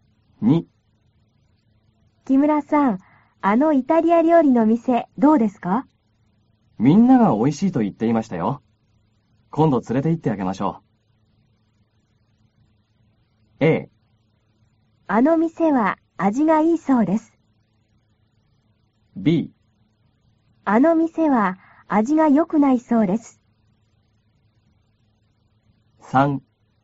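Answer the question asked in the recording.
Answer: A: あの店は味がいいそうです。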